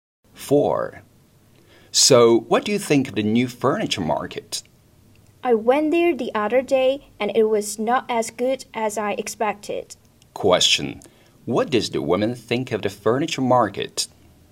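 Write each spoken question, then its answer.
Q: What does the woman think of the furniture market?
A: It was disappointing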